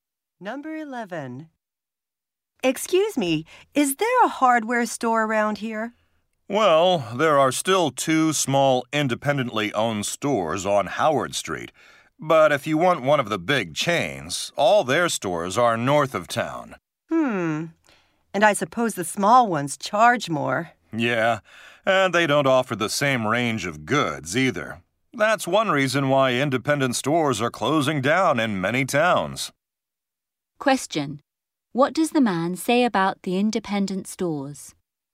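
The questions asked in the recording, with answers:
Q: What does the man say about the independent stores?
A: They charge more and have a smaller range of goods.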